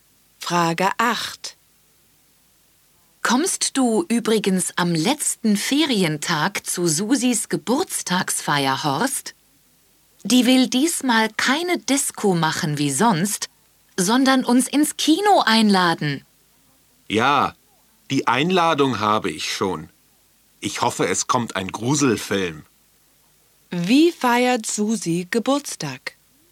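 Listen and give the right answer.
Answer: Sie lädt ins Kino ein.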